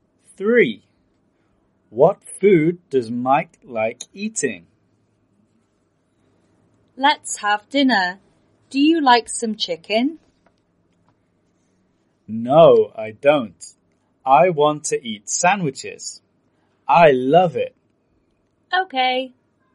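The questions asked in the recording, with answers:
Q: What food does Mike like eating?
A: Sandwiches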